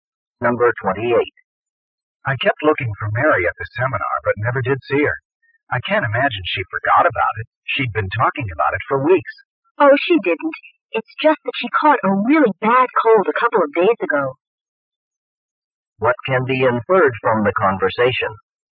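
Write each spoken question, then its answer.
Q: What can be inferred from the conversation?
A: Mary missed the seminar because she was sick with a bad cold.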